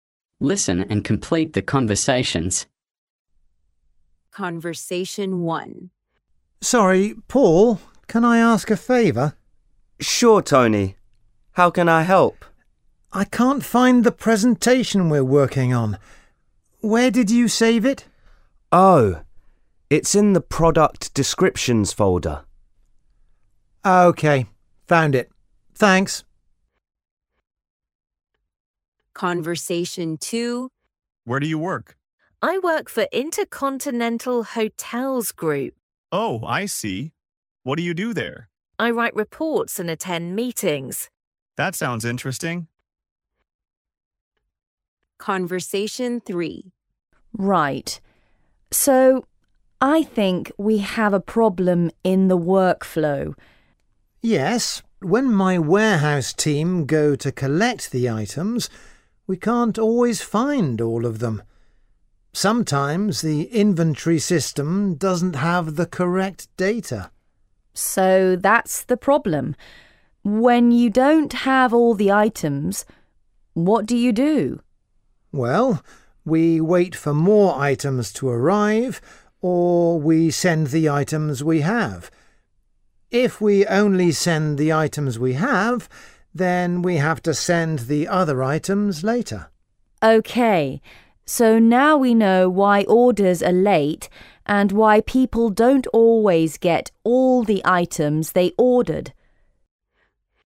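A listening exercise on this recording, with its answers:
Task 2: Choose the correct answer to complete each sentence or dialogue.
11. A: Sorry, Paul, (11) ?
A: can I ask a favour

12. I can't find the presentation we're working on. (12) ?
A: Where did you save it

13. A: (13) ?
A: Where do you work

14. A: Oh, I see. (14) there?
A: What do you do

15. A: Right. So, (15) .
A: I think we have a problem in the workflow

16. A: So that's the problem. (16) ?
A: When you don't have all the items, what do you do

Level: A1 & A1+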